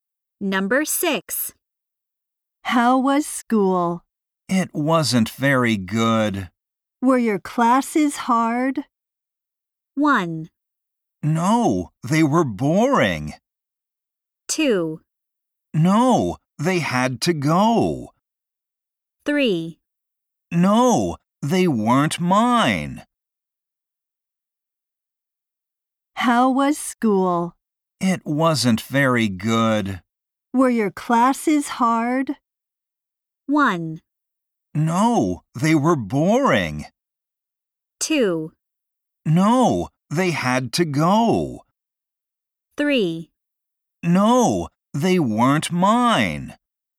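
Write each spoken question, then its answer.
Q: Were your classes hard?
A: 1: No, they were boring.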